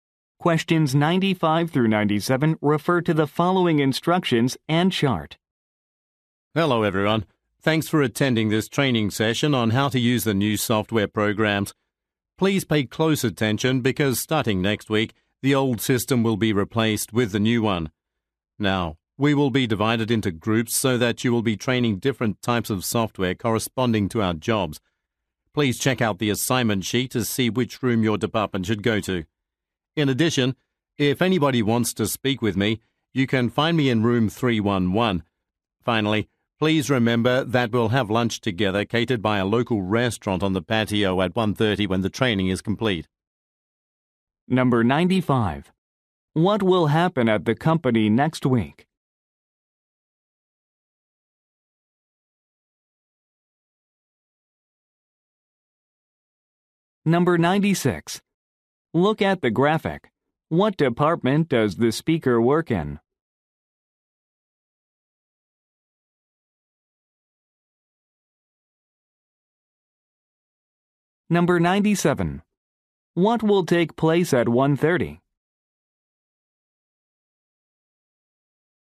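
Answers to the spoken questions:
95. The old system will be replaced with the new one
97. A catered lunch on the patio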